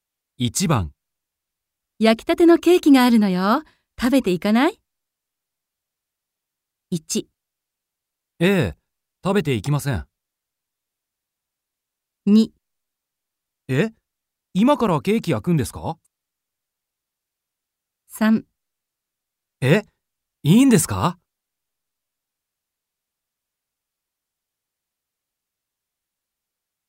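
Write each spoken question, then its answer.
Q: 焼きたてのケーキがあるのよ。食べていかない?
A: 3: え?いいんですか?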